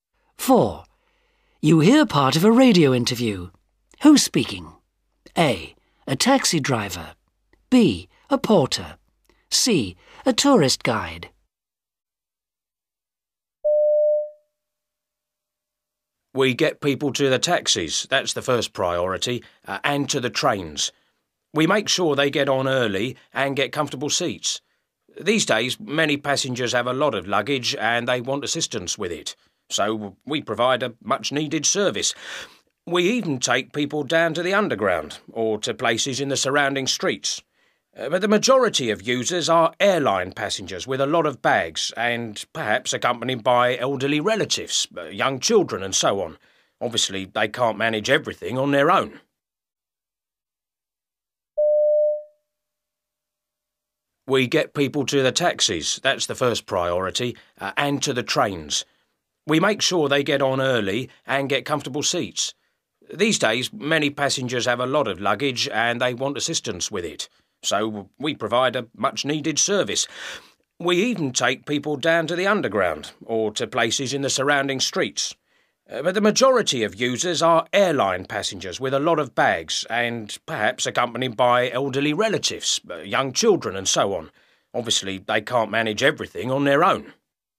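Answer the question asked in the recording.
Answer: B: A porter.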